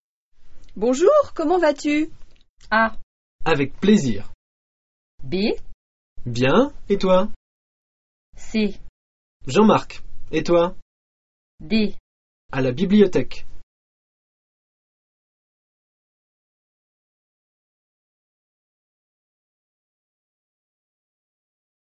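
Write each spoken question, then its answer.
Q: Bonjour, comment vas-tu?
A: B: Bien, et toi?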